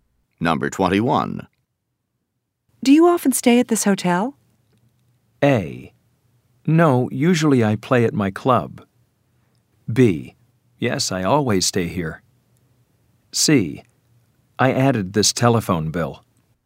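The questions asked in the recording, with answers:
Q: Do you often stay at this hotel?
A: B: Yes, I always stay here.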